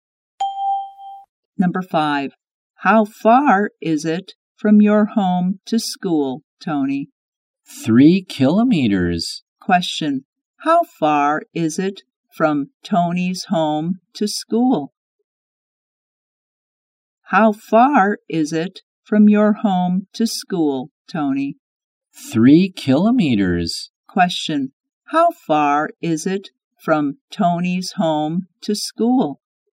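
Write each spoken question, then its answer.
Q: How far is it from Tony's home to school?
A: 3 kilometers.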